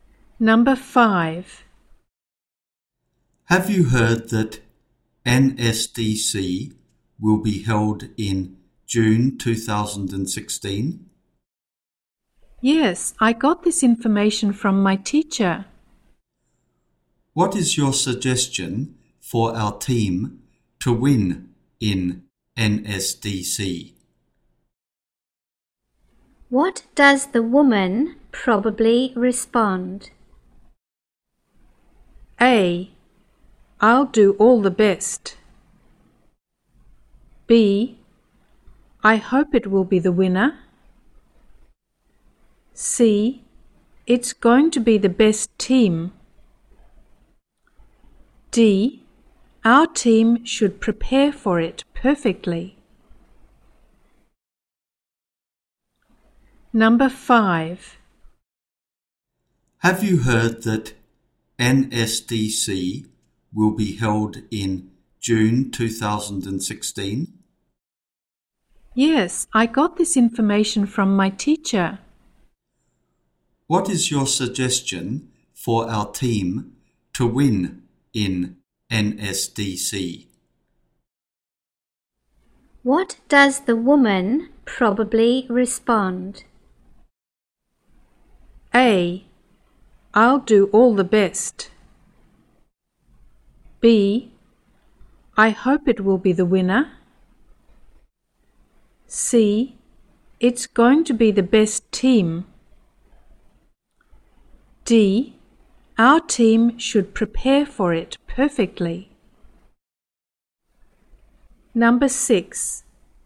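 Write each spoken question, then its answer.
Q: What does the woman probably respond?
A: D: Our team should prepare for it perfectly.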